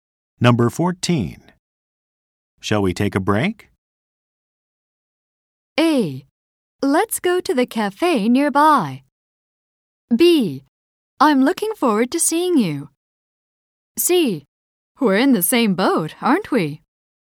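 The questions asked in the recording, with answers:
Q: Shall we take a break?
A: A: Let's go to the cafe nearby.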